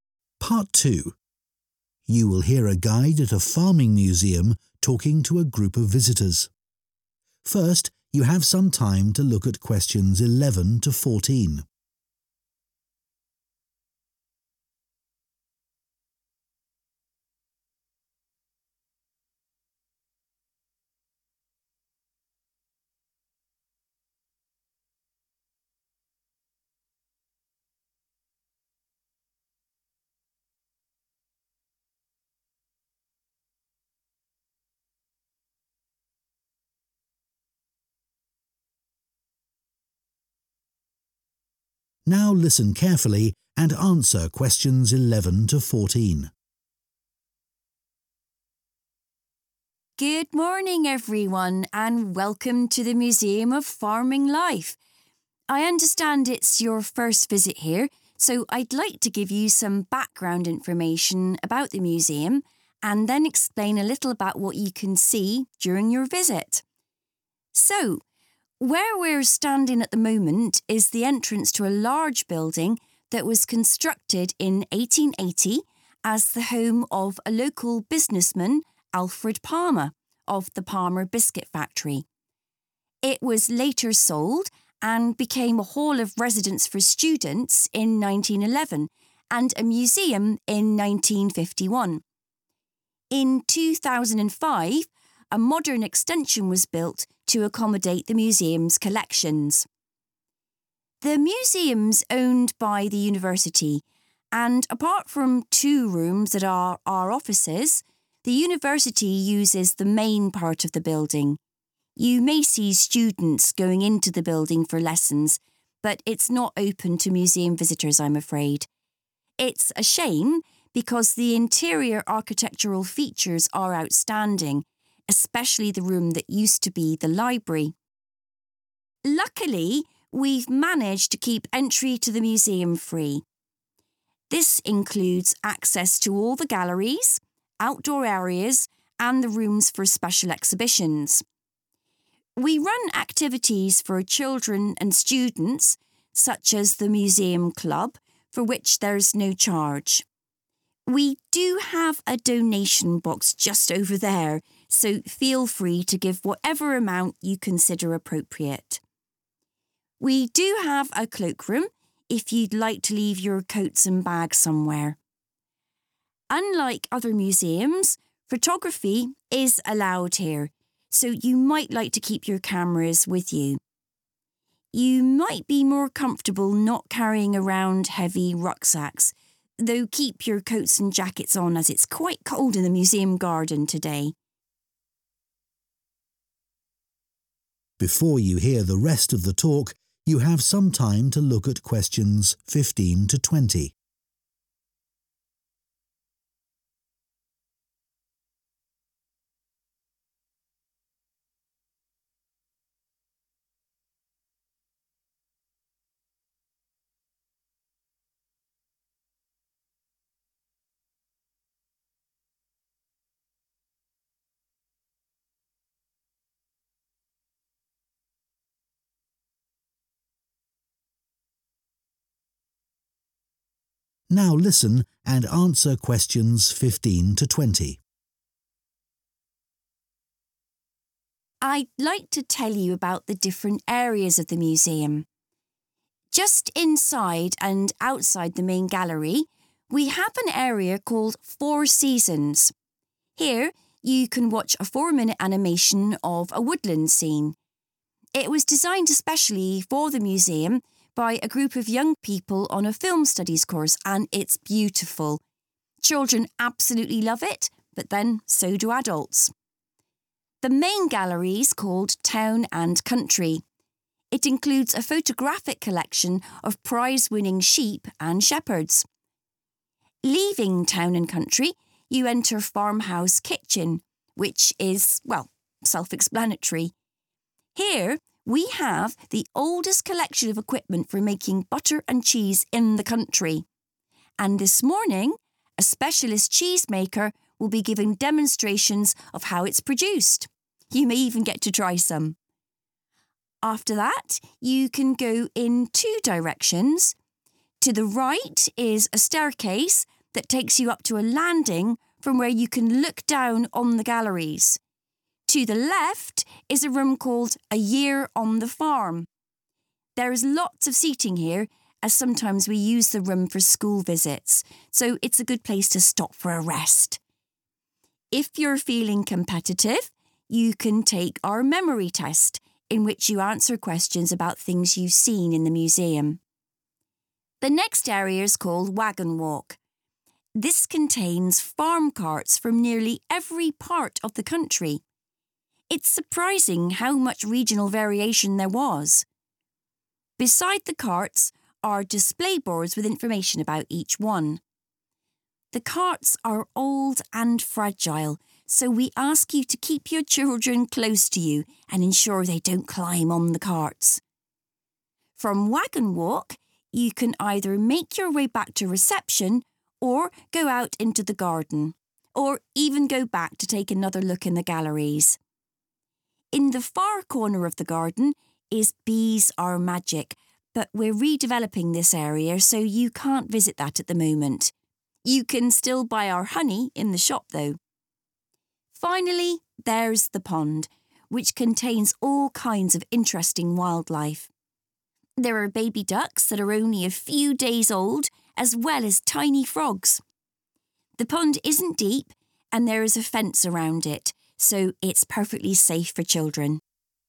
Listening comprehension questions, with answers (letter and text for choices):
Choose the correct letter, A, B or C.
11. The museum building was originally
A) a factory.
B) a private home.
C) a hall of residence.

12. The university uses part of the museum building as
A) teaching rooms.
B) a research library.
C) administration offices.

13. What does the guide say about the entrance fee?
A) Visitors decide whether or not they wish to pay.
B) Only children and students receive a discount.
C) The museum charges extra for special exhibitions.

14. What are visitors advised to leave in the cloakroom?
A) cameras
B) coats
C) bags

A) Parents must supervise their children.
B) There are new things to see.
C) It is closed today.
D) This is only for school groups.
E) There is a quiz for visitors.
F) It features something created by students.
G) An expert is here today.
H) There is a one-way system.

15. Four Seasons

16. Farmhouse Kitchen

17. A Year on the Farm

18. Wagon Walk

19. Bees are Magic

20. The Pond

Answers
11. B) a private home.
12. A) teaching rooms.
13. A) Visitors decide whether or not they wish to pay.
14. C) bags
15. F) It features something created by students.
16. G) An expert is here today.
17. E) There is a quiz for visitors.
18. A) Parents must supervise their children.
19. C) It is closed today.
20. B) There are new things to see.